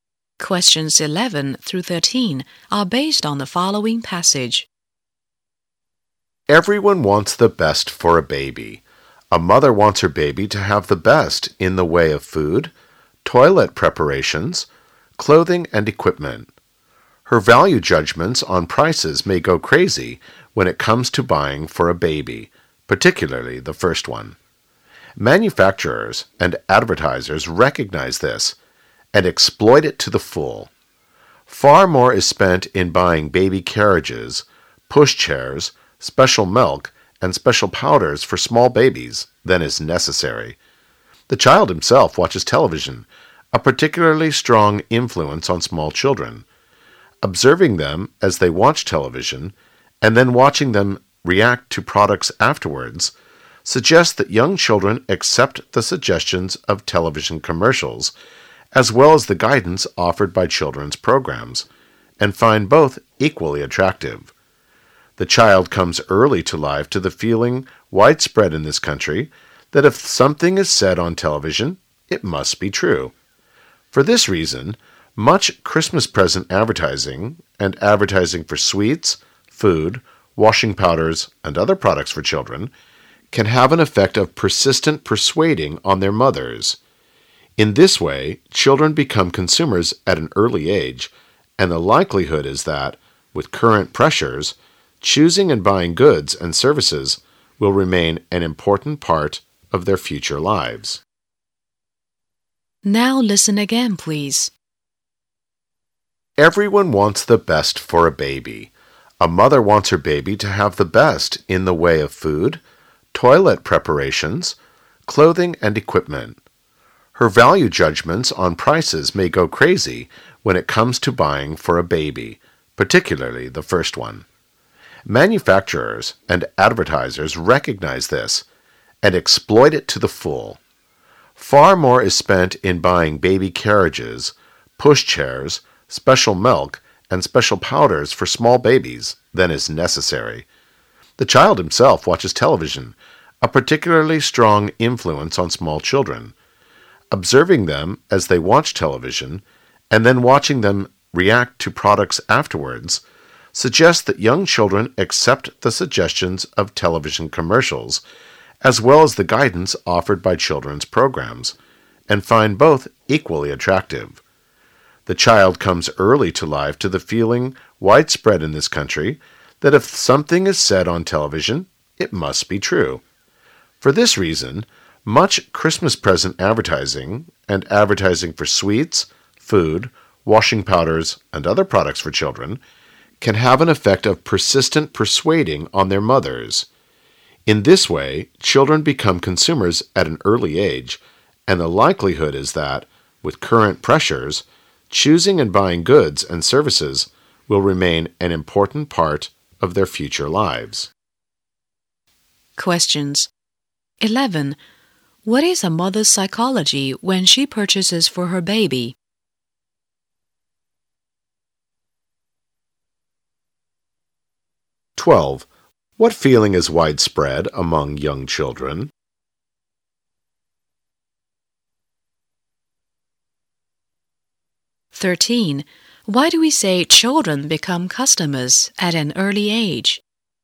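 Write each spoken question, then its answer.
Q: What is a mother's psychology when she purchases for her baby?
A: She wants the best for her baby, whatever the price

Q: What feeling is widespread among young children?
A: That whatever is said on television must be true

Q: Why do we say children become customers at an early age?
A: Because TV advertising influences them and they persuade their mothers to buy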